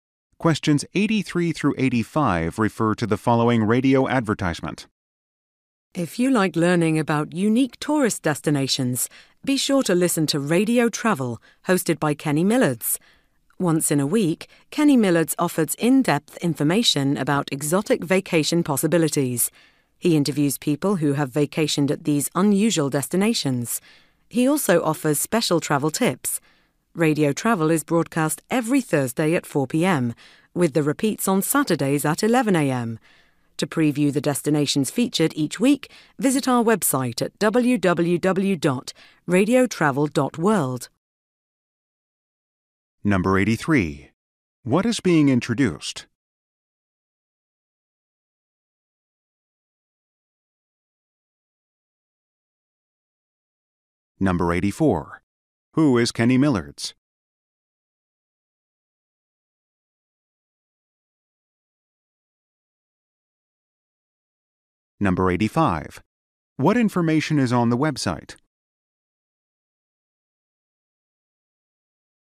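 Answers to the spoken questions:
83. A radio travel program
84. The host of Radio Travel
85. A preview of the destinations featured each week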